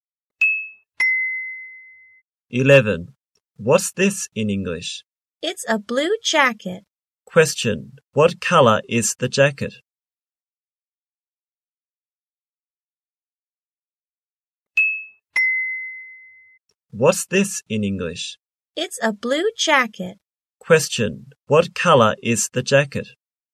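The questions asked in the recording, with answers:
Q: Question, what color is the jacket?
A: Blue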